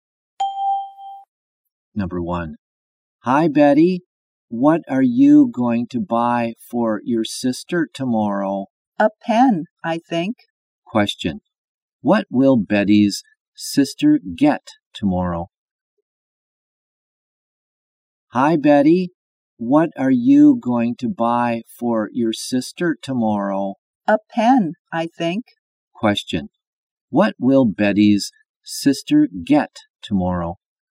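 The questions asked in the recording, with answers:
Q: What will Betty's sister get tomorrow?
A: A pen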